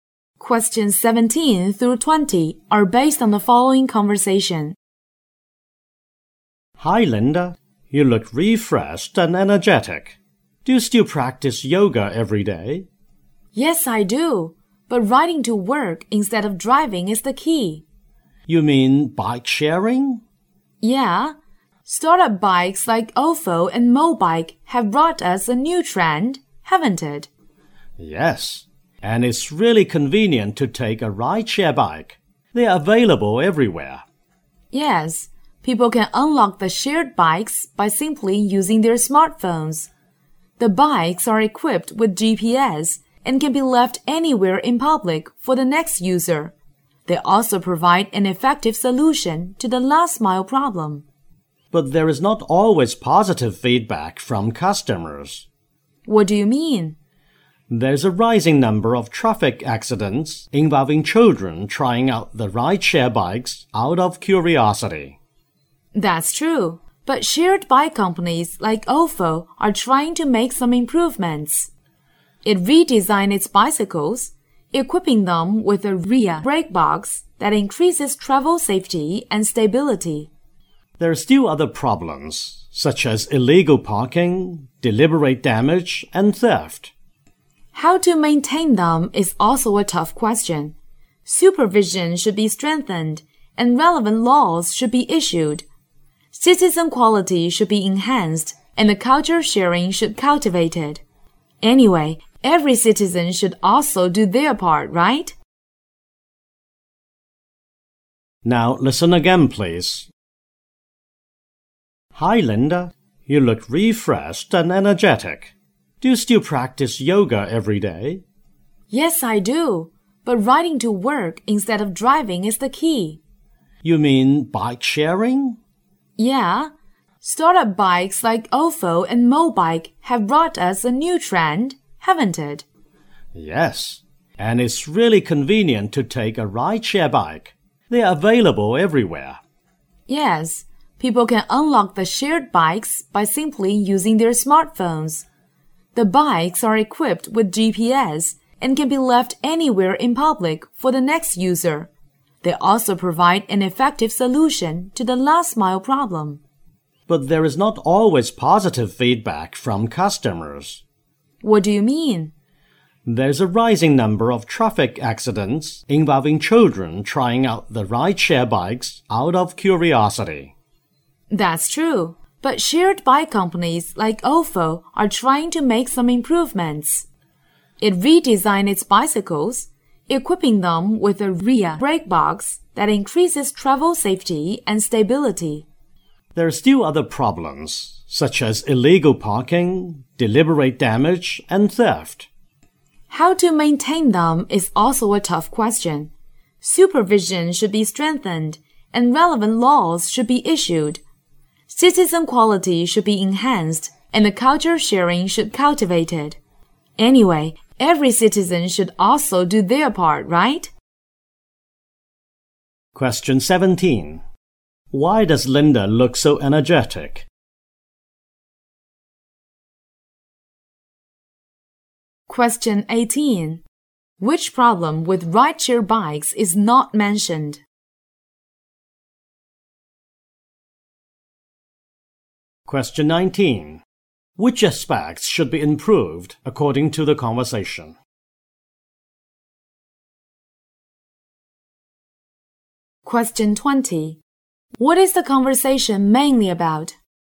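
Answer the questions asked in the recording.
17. She rides a bike to work instead of driving
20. Bike sharing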